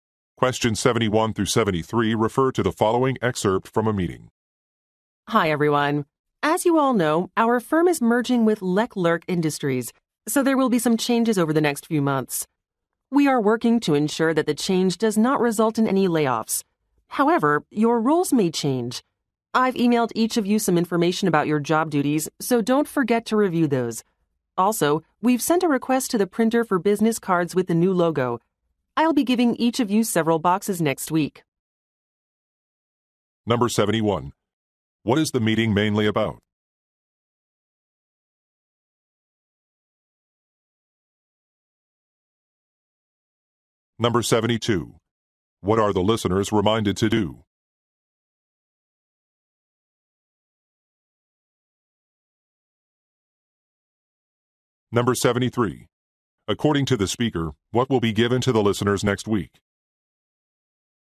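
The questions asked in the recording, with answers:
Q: What is the meeting mainly about?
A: A company merger with Leclerc Industries

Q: What are the listeners reminded to do?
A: Review information about their job duties

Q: According to the speaker, what will be given to the listeners next week?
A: Business cards with the new logo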